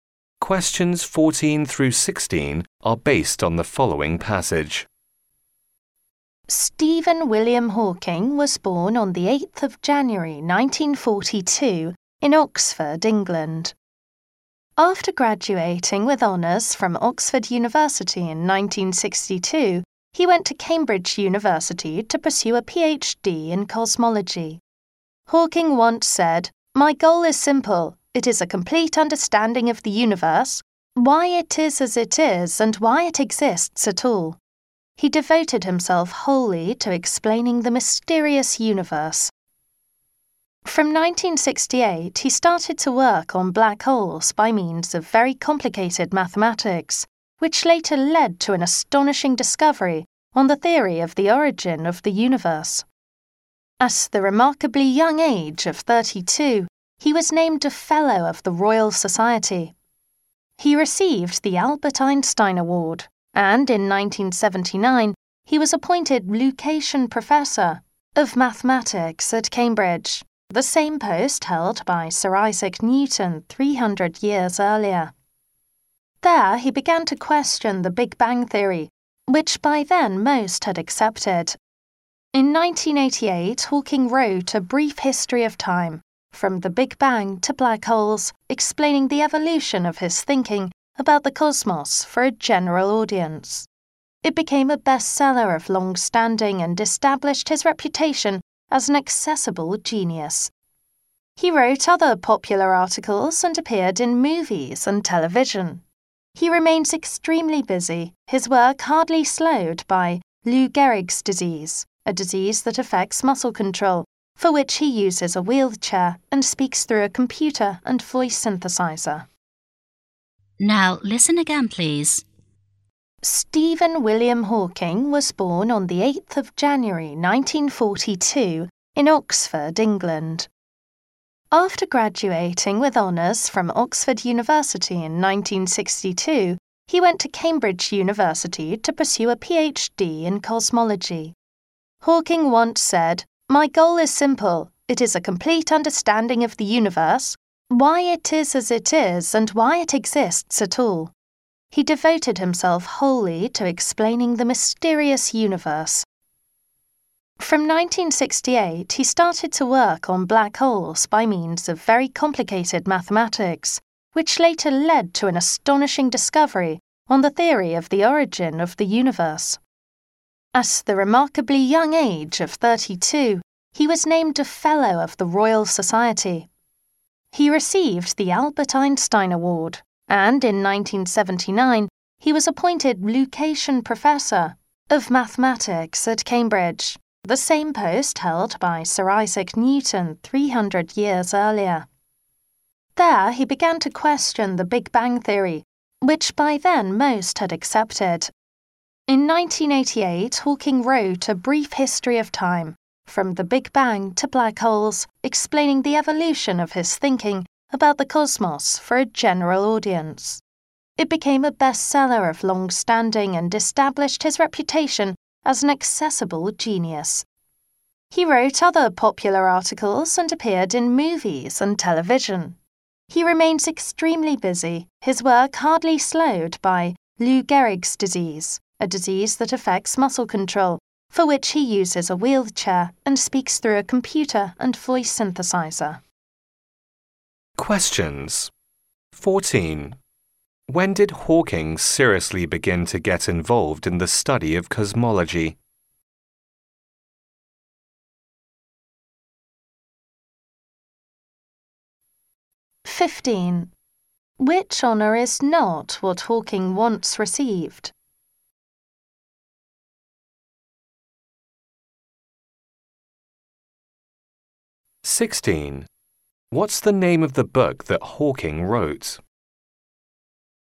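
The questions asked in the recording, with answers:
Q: When did Hawking seriously begin to get involved in the study of cosmology?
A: In 1962, when he went to Cambridge for a PhD

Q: What's the name of the book that Hawking wrote?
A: A Brief History of Time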